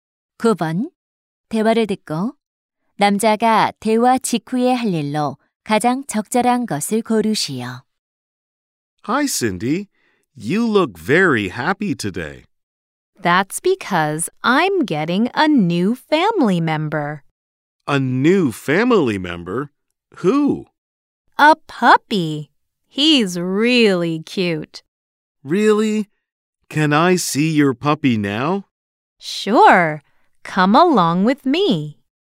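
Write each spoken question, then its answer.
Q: 대화를 듣고 남자가 대화 직후에 할 일로 가장 적절한 것을 고르시오.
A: 여자의 강아지를 보러 간다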